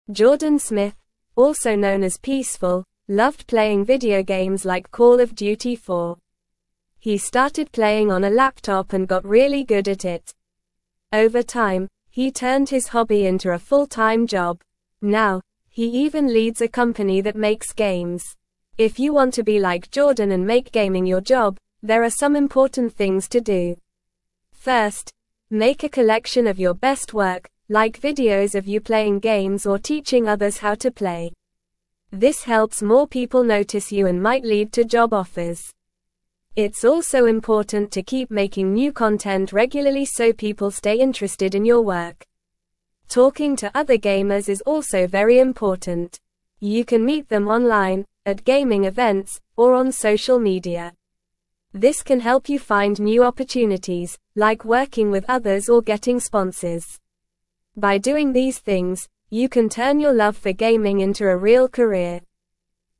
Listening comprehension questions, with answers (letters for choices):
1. What is Jordan Smith's nickname?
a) MightyGamer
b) GameMaster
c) Peeceful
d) ProPlayer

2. What video game did Jordan Smith enjoy playing?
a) Minecraft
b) Fortnite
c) The Sims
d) Call of Duty 4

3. How did Jordan turn his hobby into a job?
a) By playing games on a laptop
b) By collecting his best work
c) By talking to other gamers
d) By watching gaming videos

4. What should you make to showcase your gaming skills?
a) Videos of cats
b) Videos of you playing games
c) Cooking tutorials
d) Travel vlogs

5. Why is it important to keep making new content regularly?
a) To learn new skills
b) To become a chef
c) To keep people interested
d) To exercise more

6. Where can you meet other gamers?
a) At the library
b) Online, at gaming events, or on social media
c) At the zoo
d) At the beach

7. How can talking to other gamers help you?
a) Learn a new language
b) Become a pilot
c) Start a band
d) Find new opportunities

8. How can you turn your love for gaming into a real career?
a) By following the tips in the article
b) By never talking to other gamers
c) By quitting gaming altogether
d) By avoiding making new content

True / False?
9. Creating new content regularly can help keep people interested in your work.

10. Meeting other gamers can lead to collaborations or sponsorships.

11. Talking to other gamers, whether online, at events, or on social media, is unnecessary for finding new opportunities in the gaming world.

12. Now, Jordan leads a company that creates games.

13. By ignoring these steps, you can turn your passion for gaming into a successful career.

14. Jordan Smith, also known as Peeceful, turned his love for playing video games into a full-time job.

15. He started playing Call of Duty 4 on a laptop and became really bad at it.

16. To make gaming your job, it's not necessary to showcase your best work, like videos of you playing games or teaching others.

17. Jordan Smith, also (1)______ as (2)______, (3)______ playing video games like Call of Duty 4.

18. Jordan Smith, also (1)______ as (2)______, (3)______ playing video games like Call of Duty 4.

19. Jordan Smith, also (1)______ as (2)______, (3)______ playing video games like Call of Duty 4.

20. Now, he even leads a company that (4)______ (5)______.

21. Now, he even leads a company that (4)______ (5)______.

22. If you want to be like (6)______ and make gaming your job, there are some important things to do.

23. This helps more (7)______ notice you and might lead to job offers.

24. It's also important to keep making new content regularly so people stay (8)______ in your work.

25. (9)______ to other gamers is also very important.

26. You can meet them online, at gaming events, or on social (10)______.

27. This can (11)______ you find new opportunities, like working with others or getting sponsors.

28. By doing these things, you can turn your love for gaming into a (12)______ career.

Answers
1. c
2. d
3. a
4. b
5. c
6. b
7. d
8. a
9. True
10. True
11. False
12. True
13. False
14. True
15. False
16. False
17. known
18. Peeceful
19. loved
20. makes
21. games
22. Jordan
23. people
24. interested
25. Talking
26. media
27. help
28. real

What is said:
Jordan Smith, also known as Peeceful, loved playing video games like Call of Duty 4. He started playing on a laptop and got really good at it. Over time, he turned his hobby into a full-time job. Now, he even leads a company that makes games.
If you want to be like Jordan and make gaming your job, there are some important things to do. First, make a collection of your best work, like videos of you playing games or teaching others how to play. This helps more people notice you and might lead to job offers. It's also important to keep making new content regularly so people stay interested in your work.
Talking to other gamers is also very important. You can meet them online, at gaming events, or on social media. This can help you find new opportunities, like working with others or getting sponsors. By doing these things, you can turn your love for gaming into a real career.

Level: Level 2